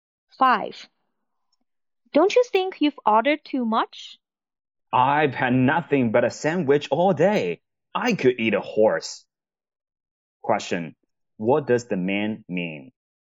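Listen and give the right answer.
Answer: He is very hungry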